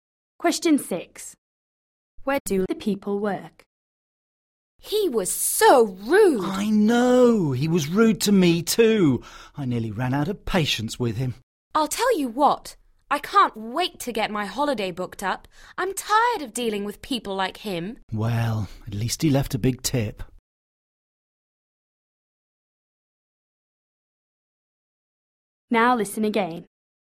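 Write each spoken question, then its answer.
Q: Where do the people work?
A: in a restaurant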